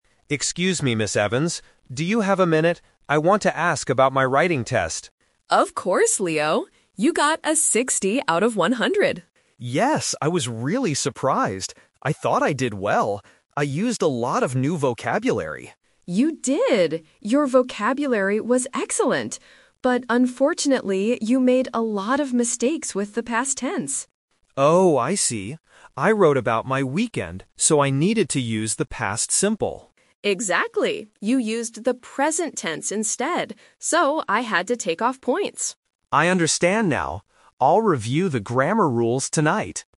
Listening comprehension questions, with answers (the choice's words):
Listen to the conversation and circle the correct answer (A, B, or C).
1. Why is Leo talking to Ms. Evans?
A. To ask about his test score.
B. To learn new vocabulary.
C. To tell her about his weekend.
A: To ask about his test score.

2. What did the teacher like about Leo's test?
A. His spelling.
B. His grammar.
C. His vocabulary.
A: His vocabulary.

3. Why did Leo get a low score?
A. He didn't write enough words.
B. He used the wrong verb tense.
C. He forgot to write about his weekend.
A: He used the wrong verb tense.

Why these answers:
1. Leo clearly states his reason at the beginning: "I want to ask about my writing test." Why the trap is wrong: Options (B) and (C) are traps. "Vocabulary" and "weekend" are mentioned later in the conversation as details about the test, but they are not the reason he went to talk to the teacher.
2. The teacher explicitly praises this part of his test: "Your vocabulary was excellent." Why the trap is wrong: Option (B) is the trap. Grammar (past tense) is exactly what he had trouble with, not what was good. Option (A) was not mentioned.
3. The teacher explains, "you made a lot of mistakes with the past tense... You used the present tense instead." Why the trap is wrong: Option (C) is a trap. The audio mentions his weekend, but he did write about it ("I wrote about my weekend"). The problem was the grammar he used to write about it. Option (A) is plausible but not mentioned.

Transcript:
Evans. Do you have a minute? I want to ask about my writing test.
Ms. Evans: Of course, Leo. You got a 60 out of 100.
Leo: Yes, I was really surprised! I thought I did well. I used a lot of new vocabulary.
Evans: You did! Your vocabulary was excellent. But unfortunately, you made a lot of mistakes with the past tense.
Leo: Oh, I see. I wrote about my weekend, so I needed to use the past simple.
Evans: Exactly. You used the present tense instead. So, I had to take off points.